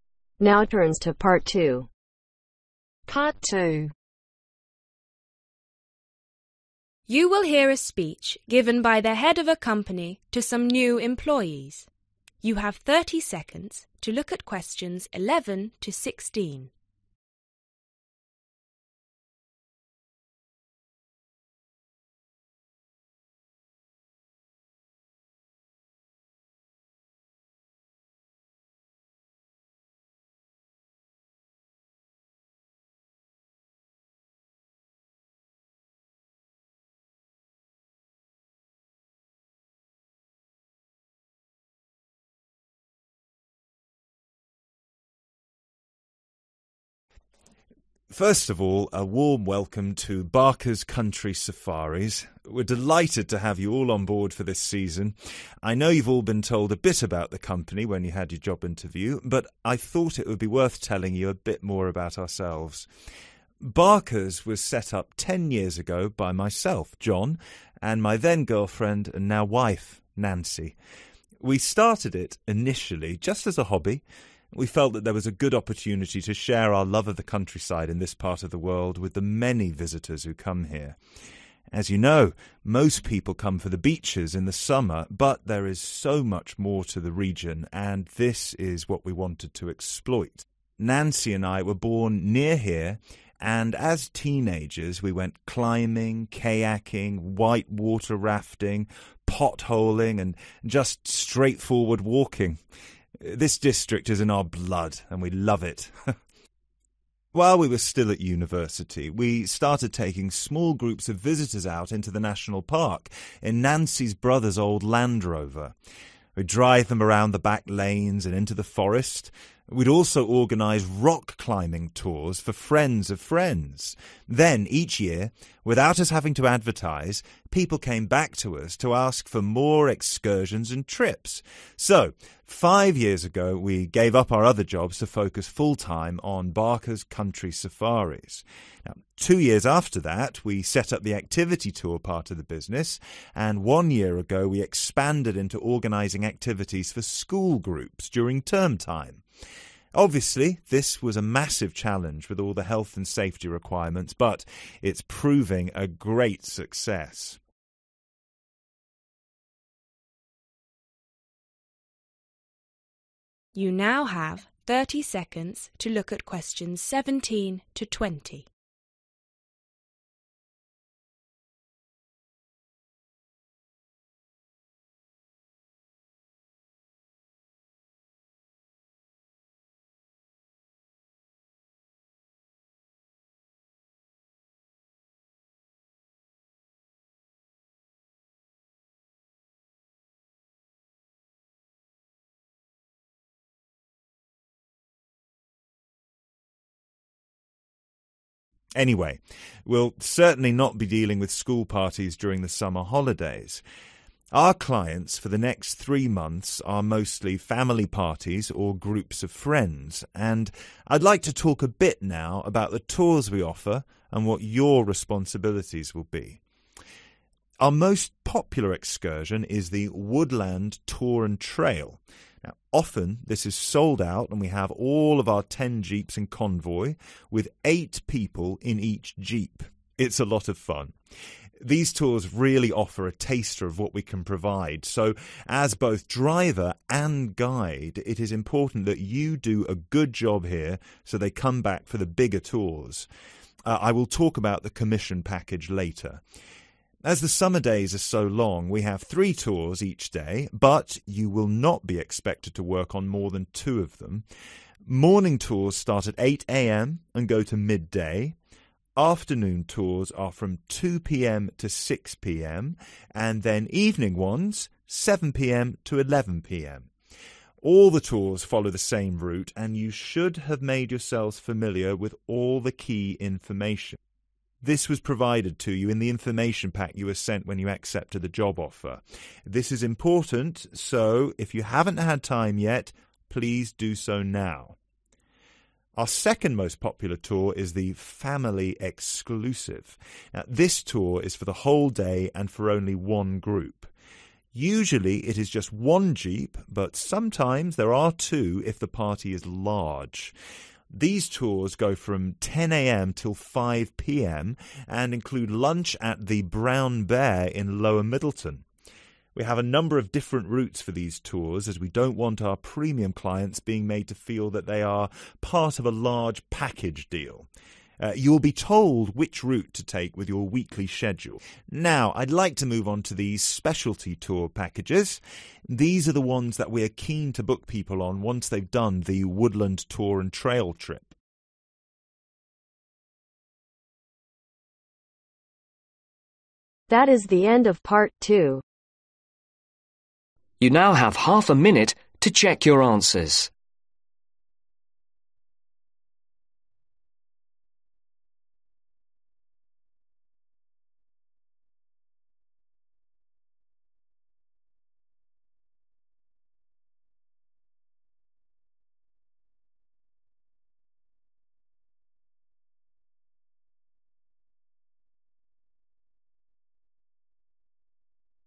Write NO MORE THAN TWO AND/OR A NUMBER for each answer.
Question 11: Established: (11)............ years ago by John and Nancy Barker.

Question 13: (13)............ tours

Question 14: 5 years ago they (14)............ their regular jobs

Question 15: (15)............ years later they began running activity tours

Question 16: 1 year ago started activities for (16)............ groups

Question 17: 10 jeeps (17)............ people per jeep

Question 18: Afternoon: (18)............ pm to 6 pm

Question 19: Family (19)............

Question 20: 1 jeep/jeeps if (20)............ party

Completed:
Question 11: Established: 10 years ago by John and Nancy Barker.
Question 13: Rock climbing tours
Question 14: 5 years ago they Gave up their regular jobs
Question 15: 2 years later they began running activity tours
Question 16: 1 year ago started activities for School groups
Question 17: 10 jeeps 8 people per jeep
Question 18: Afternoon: 2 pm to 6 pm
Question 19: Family Exclusive
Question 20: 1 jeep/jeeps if Large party